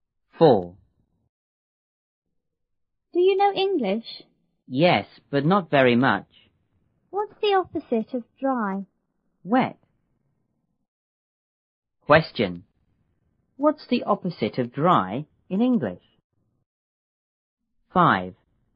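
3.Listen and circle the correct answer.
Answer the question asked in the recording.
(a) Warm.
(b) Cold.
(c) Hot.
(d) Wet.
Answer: (d) Wet.

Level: 六年级下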